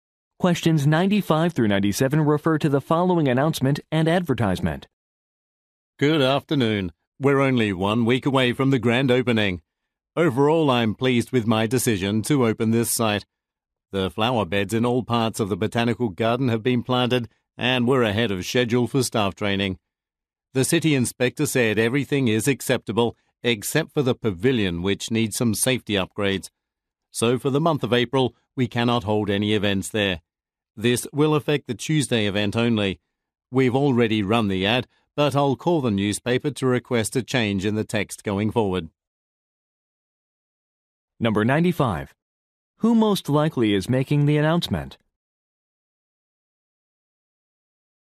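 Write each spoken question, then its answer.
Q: Who most likely is making the announcement?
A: The owner of a botanical garden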